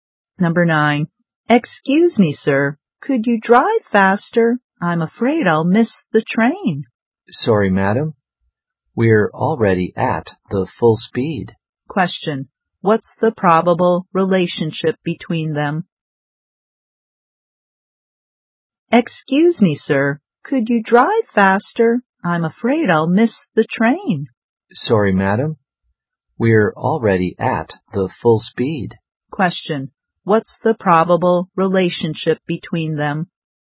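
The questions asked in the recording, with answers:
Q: what's the probable relationship between them?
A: Taxi driver and passenger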